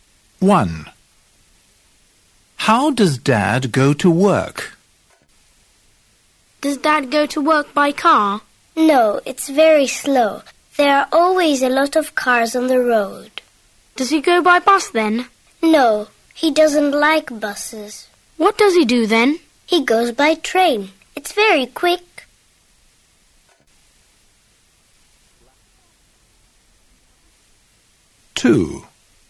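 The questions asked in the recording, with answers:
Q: How does Dad go to work?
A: By train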